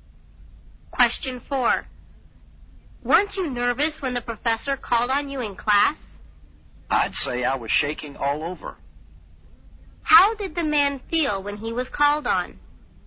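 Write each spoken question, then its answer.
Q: How did the man feel when he was called on?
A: Very nervous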